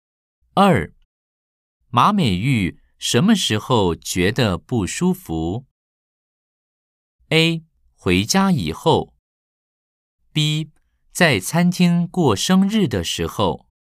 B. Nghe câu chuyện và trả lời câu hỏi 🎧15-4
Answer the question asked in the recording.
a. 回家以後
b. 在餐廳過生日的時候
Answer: a. 回家以後